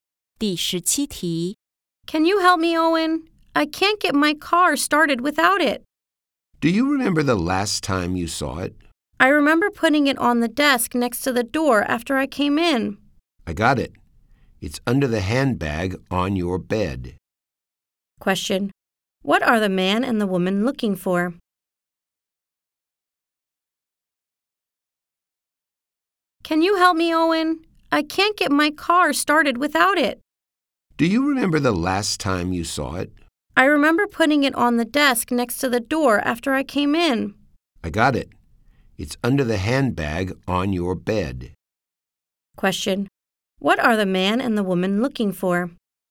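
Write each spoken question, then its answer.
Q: What are the man and the woman looking for?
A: The car key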